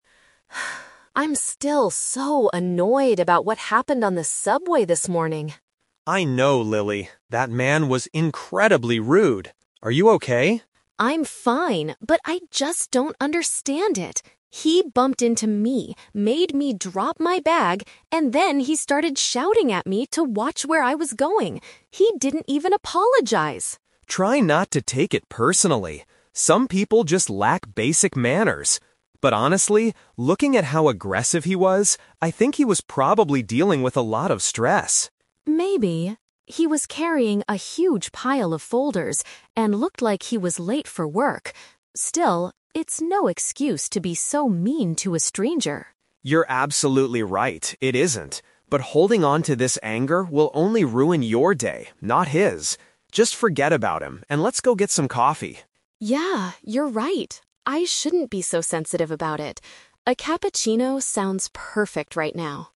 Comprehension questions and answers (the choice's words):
Listen to a conversation between two friends, Lily and Tom. For each question, choose the correct answer A, B, or (C).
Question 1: Why is Lily upset at the beginning of the conversation?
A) Someone stole her bag while she was on the subway.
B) A stranger blamed her when they crashed into each other.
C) She missed her morning train because she dropped her bag.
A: A stranger blamed her when they crashed into each other.

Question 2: What does Tom believe about the stranger's behavior?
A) He was probably having a difficult and pressured day.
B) He is naturally a dangerous and violent person.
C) He did not realize that he had pushed Lily.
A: He was probably having a difficult and pressured day.

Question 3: How does Tom suggest Lily should handle her negative feelings?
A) By reporting the rude man to the subway security.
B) By stopping the man and demanding a clear apology.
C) By letting go of her anger and focusing on something else.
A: By letting go of her anger and focusing on something else.

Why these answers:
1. Lily explains that the man "bumped into me" (crashed) and then "started shouting at me to watch where I was going." This means he blamed her for the accident.
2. Tom analyzes the situation and says, "I think he was probably dealing with a lot of stress." A stressed person is having a difficult and pressured day.
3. Tom tells Lily that "holding onto this anger will only ruin your day" and advises her to "Just forget about him and let's go get some coffee." This means she should let go of her negative emotions.

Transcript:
Lily: I'm still so annoyed about what happened on the subway this morning.
Tom: I know, Lily. That man was incredibly rude. Are you okay?
Lily: I'm fine, but I just don't understand it! He bumped into me, made me drop my bag, and then he started shouting at me to watch where I was going. He didn't even apologize!
Tom: Try not to take it personally. Some people just lack basic manners. But honestly, looking at how aggressive he was, I think he was probably dealing with a lot of stress.
Lily: Maybe. He was carrying a huge pile of folders and looked like he was late for work. Still, it's no excuse to be so mean to a stranger.
Tom: You're absolutely right, it isn't. But holding onto this anger will only ruin your day, not his. Just forget about him and let's go get some coffee.
Lily: Yeah, you're right. I shouldn't be so sensitive about it. A cappuccino sounds perfect right now.